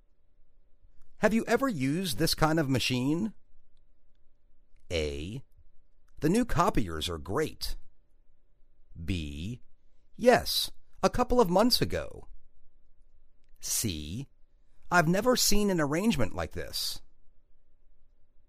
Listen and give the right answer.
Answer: Yes, a couple of months ago.